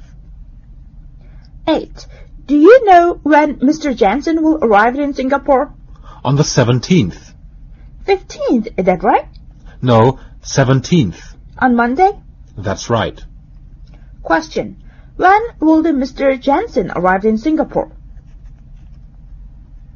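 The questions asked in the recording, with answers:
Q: Jensen arrive in Singapore?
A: Monday the 17th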